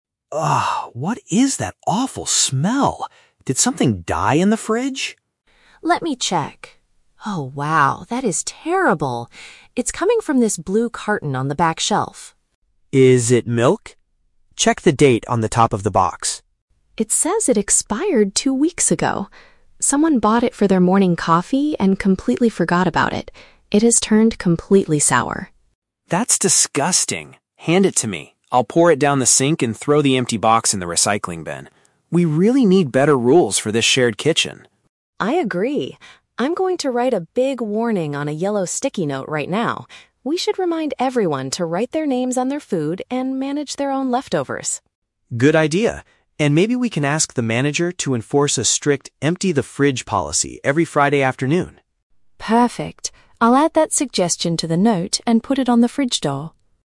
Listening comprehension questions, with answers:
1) What causes the terrible smell in the office kitchen?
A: A spoiled dairy product left on the back shelf.

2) What is Tom going to do immediately with the bad item?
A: Empty the liquid and dispose of the packaging.

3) How do Sarah and Tom plan to prevent this issue in the future?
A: By displaying a written reminder about personal food management.

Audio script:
Tom: Ugh, what is that awful smell? Did something die in the fridge?
Sarah: Let me check. Oh wow, that is terrible. It's coming from this blue carton on the back shelf.
Tom: Is it milk? Check the date on the top of the box.
Sarah: It says it expired two weeks ago! Someone bought it for their morning coffee and completely forgot about it. It has turned completely sour.
Tom: That's disgusting. Hand it to me. I'll pour it down the sink and throw the empty box in the recycling bin. We really need better rules for this shared kitchen.
Sarah: I agree. I'm going to write a big warning on a yellow sticky note right now. We should remind everyone to write their names on their food and manage their own leftovers.
Tom: Good idea. And maybe we can ask the manager to enforce a strict "empty the fridge" policy every Friday afternoon.
Sarah: Perfect. I'll add that suggestion to the note and put it on the fridge door.